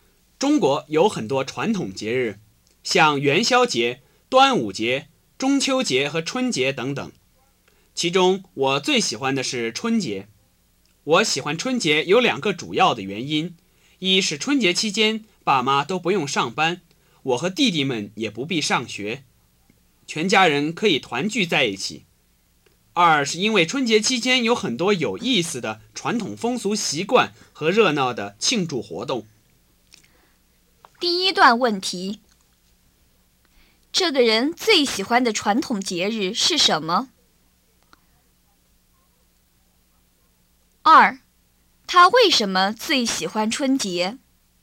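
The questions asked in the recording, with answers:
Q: 这个人最喜欢的传统节日是什么?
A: 春节

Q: 他为什么最喜欢春节?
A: 全家可以团聚,而且有很多有意思的传统风俗习惯和热闹的庆祝活动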